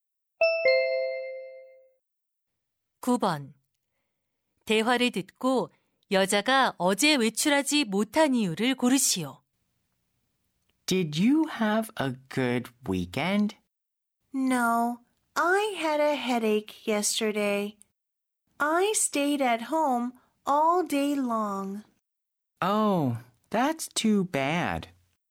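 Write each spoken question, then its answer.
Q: 대화를 듣고 여자가 어제 외출하지 못한 이유를 고르시오.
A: 두통이 있어서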